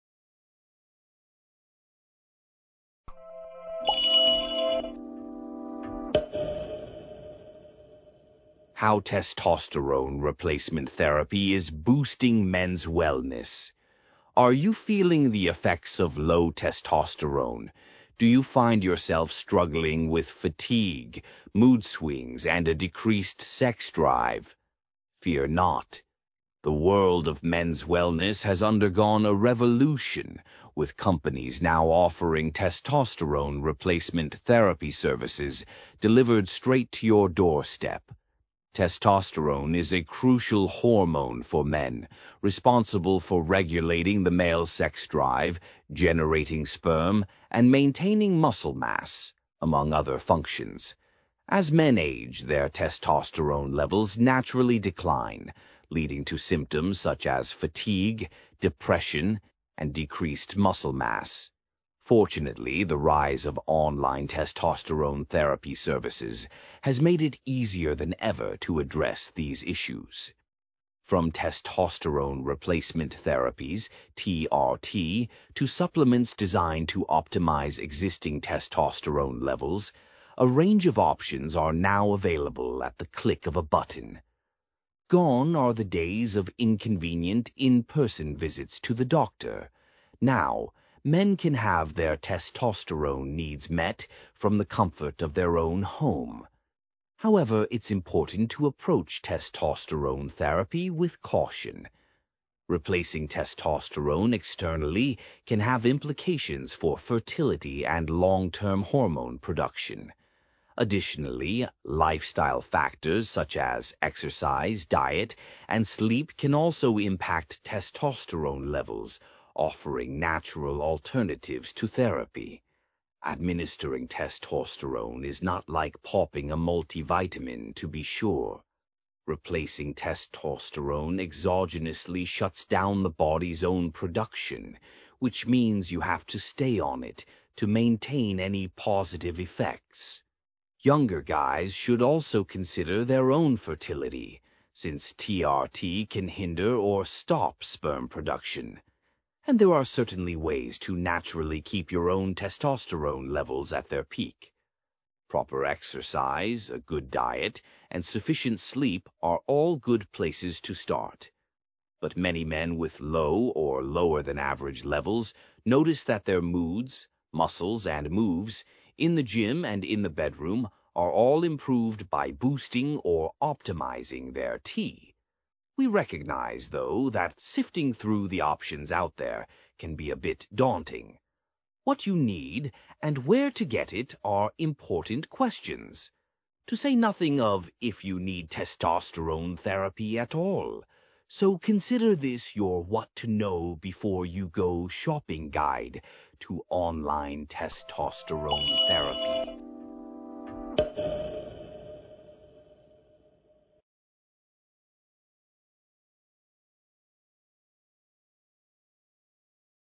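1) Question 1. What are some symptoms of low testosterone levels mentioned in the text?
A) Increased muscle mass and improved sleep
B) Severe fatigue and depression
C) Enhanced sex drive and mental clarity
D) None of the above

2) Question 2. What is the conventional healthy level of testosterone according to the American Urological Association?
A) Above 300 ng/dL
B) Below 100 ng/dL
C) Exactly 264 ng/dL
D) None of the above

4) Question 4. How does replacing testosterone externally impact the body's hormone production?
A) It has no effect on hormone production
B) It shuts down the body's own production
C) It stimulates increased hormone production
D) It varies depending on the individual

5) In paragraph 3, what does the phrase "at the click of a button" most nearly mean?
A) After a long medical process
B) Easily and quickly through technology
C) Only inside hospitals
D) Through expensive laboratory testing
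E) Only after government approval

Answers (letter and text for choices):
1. B) Severe fatigue and depression
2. D) None of the above
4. B) It shuts down the body's own production
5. B) Easily and quickly through technology

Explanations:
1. Procure no segundo parágrafo onde o texto lista "symptoms such as..." — a resposta está praticamente copiada dali
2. Se você não viu nenhum número específico no texto... provavelmente ele não está lá.
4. Quando uma questão lista vários métodos médicos, pergunte-se: o texto limita ou amplia as opções?

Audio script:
Are you feeling the effects of low testosterone? Do you find yourself struggling with fatigue, mood swings, and a decreased sex drive? Fear not! The world of men's wellness has undergone a revolution, with companies now offering testosterone replacement therapy services delivered straight to your doorstep.
Testosterone is a crucial hormone for men, responsible for regulating the male sex drive, generating sperm, and maintaining muscle mass, among other functions. 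As men age, their testosterone levels naturally decline, leading to symptoms such as fatigue, depression, and decreased muscle mass.
Fortunately, the rise of online testosterone therapy services has made it easier than ever to address these issues. From testosterone replacement therapies (TRT) to supplements designed to optimize existing testosterone levels, a range of options are now available at the click of a button. Gone are the days of inconvenient in-person visits to the doctor – now, men can have their testosterone needs met from the comfort of their own home.
However, it's important to approach testosterone therapy with caution. Replacing testosterone externally can have implications for fertility and long-term hormone production. Additionally, lifestyle factors such as exercise, diet, and sleep can also impact testosterone levels, offering natural alternatives to therapy.
Administering testosterone is not like popping a multivitamin, to be sure. 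Replacing testosterone exogenously shuts down the body's own production, which means you have to stay on it to maintain any positive effects. Younger guys should also consider their own fertility, since TRT can hinder or stop sperm production. And there are certainly ways to naturally keep your own testosterone levels at their peak: proper exercise, a good diet, and sufficient sleep are all good places to start. But many men with low or lower-than-average levels notice that their moods, muscles, and moves–in the gym and in the bedroom–are all improved by boosting or optimizing their T.
We recognize, though, that sifting through the options out there can be a bit daunting. What you need and where to get it are important questions. To say nothing of if you need testosterone therapy at all. So consider this your what-to-know-before-you-go shopping guide to online testosterone therapy.

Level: CEFR Level: B2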